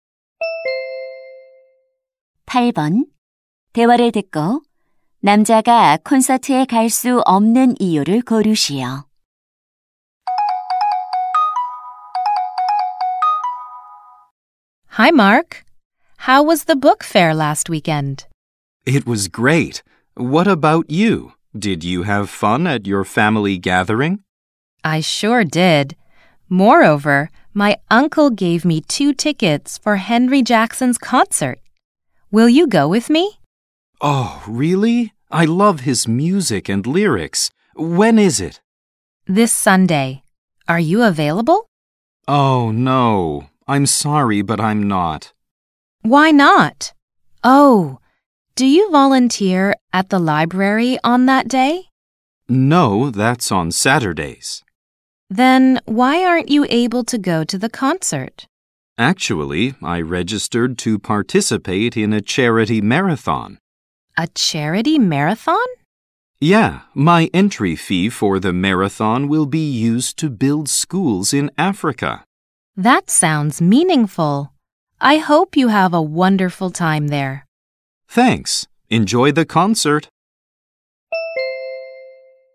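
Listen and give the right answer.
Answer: 자선 마라톤에 참가해야 해서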